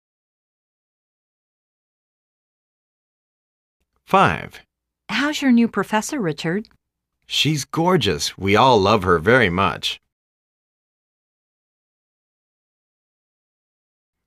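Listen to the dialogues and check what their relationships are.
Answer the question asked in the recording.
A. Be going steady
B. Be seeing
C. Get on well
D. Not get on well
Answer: C. Get on well

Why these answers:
A:How's your new professor, Richard? B:She's gorgeous. We all love her very much!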